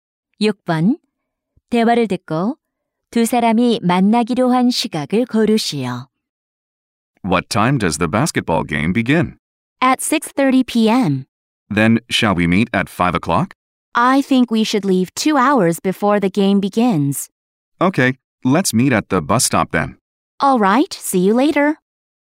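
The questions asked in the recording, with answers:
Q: 대화를 듣고 두 사람이 만나기로 한 시각을 고르시오.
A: 오후 4시 30분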